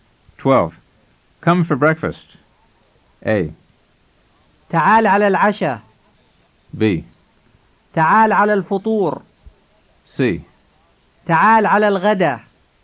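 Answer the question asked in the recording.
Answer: B: تعال على الفطور.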